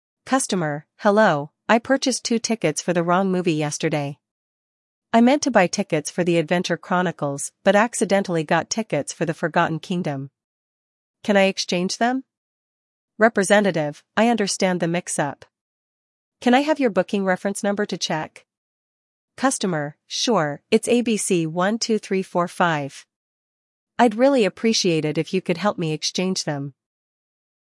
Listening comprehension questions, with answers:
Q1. What is the issue the customer is facing?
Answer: The customer purchased the wrong movie tickets.

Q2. What movie did the customer accidentally purchase tickets for?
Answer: The customer accidentally bought tickets for The Forgotten Kingdom.

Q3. What information does the representative ask for?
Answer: The representative asks for the booking reference number.

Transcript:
Customer: Hello, I purchased two tickets for the wrong movie yesterday. I meant to buy tickets for The Adventure Chronicles but accidentally got tickets for The Forgotten Kingdom. Can I exchange them?
Representative: I understand the mix-up. Can I have your booking reference number to check?
Customer: Sure, it's ABC12345. I'd really appreciate it if you could help me exchange them.